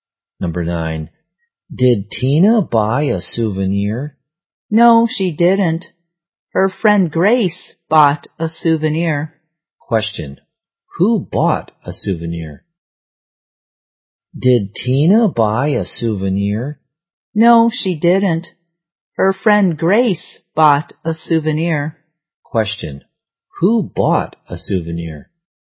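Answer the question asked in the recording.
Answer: Grace.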